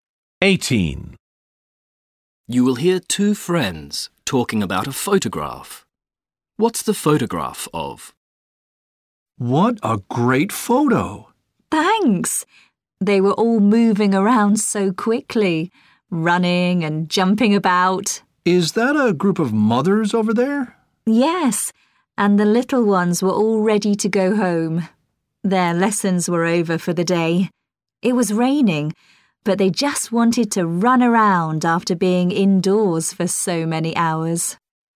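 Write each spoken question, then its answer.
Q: What's the photograph of?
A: Children playing after school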